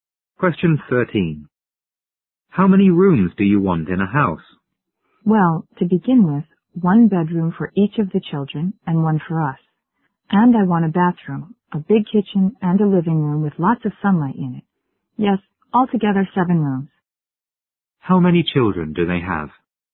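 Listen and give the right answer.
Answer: Three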